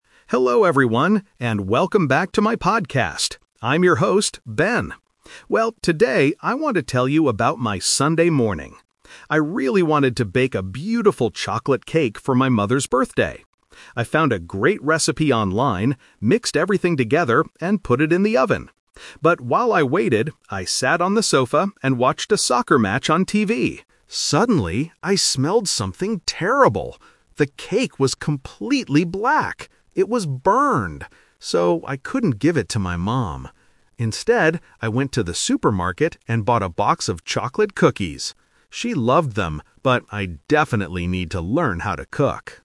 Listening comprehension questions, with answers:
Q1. Why did Ben want to bake a cake?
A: For his mother's birthday.

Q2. What did Ben do while the cake was in the oven?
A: He watched a soccer match.

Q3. What did Ben give to his mother in the end?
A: A box of chocolate cookies.

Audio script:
Ben (Host): Hello everyone, and welcome back to my podcast! I'm your host, Ben. Well, today, I want to tell you about my Sunday morning. I really wanted to bake a beautiful chocolate cake for my mother's birthday. I found a great recipe online, mixed everything together, and put it in the oven. But while I waited, I sat on the sofa and watched a soccer match on TV. Suddenly, I smelled something terrible! The cake was completely black. It was burned! So, I couldn't give it to my mom. Instead, I went to the supermarket and bought a box of chocolate cookies. She loved them, but I definitely need to learn how to cook!

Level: A2